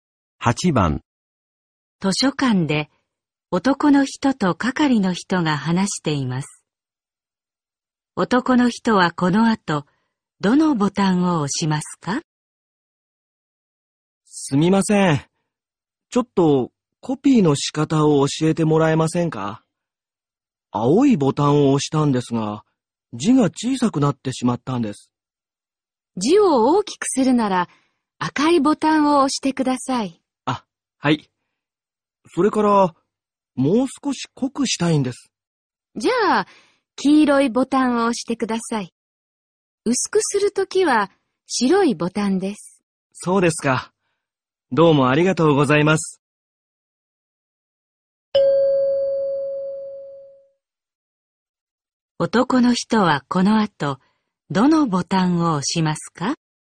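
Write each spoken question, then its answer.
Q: 男の人はこの後、どのボタンを押しますか?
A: 赤いボタンと黄色いボタン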